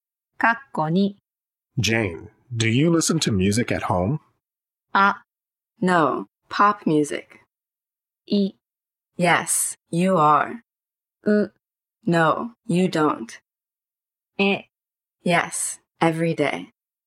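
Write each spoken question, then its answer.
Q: Jane, do you listen to music at home?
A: え: Yes, every day.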